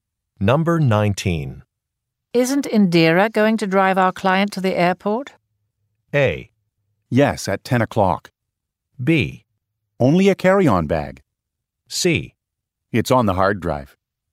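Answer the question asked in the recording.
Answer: A: Yes, at 10 o'clock.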